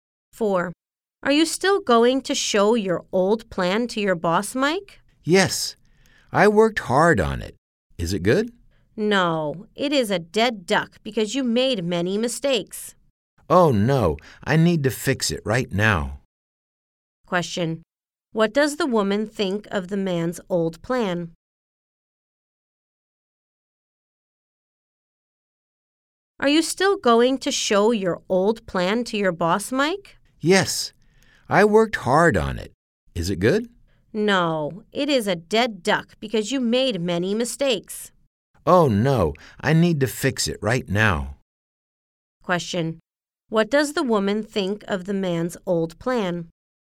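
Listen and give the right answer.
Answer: It is a failure with many mistakes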